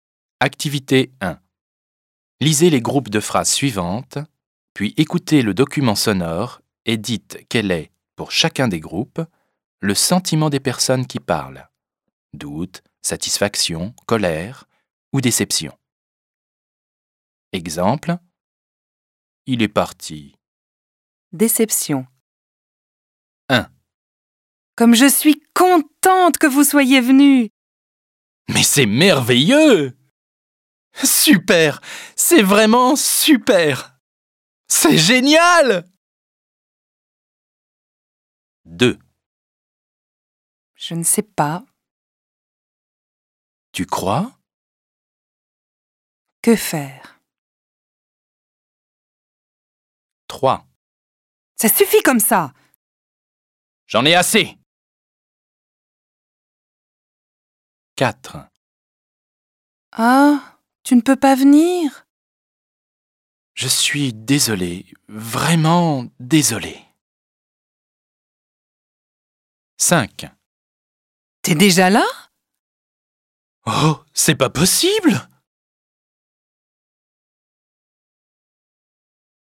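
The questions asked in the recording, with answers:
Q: dites quel est, pour chacun des groupes, le sentiment des personnes qui parlent.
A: satisfaction

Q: dites quel est, pour chacun des groupes, le sentiment des personnes qui parlent.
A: doute

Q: dites quel est, pour chacun des groupes, le sentiment des personnes qui parlent.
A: colère

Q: dites quel est, pour chacun des groupes, le sentiment des personnes qui parlent.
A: déception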